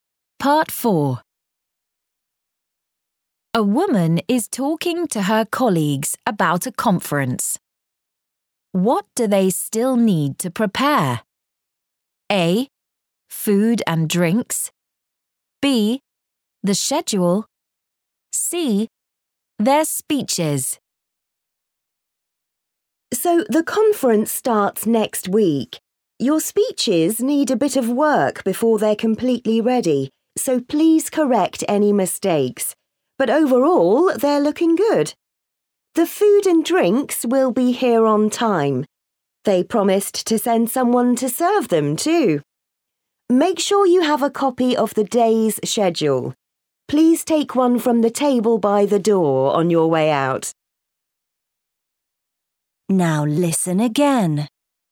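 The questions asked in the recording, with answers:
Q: What do they still need to prepare?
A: C: Their speeches.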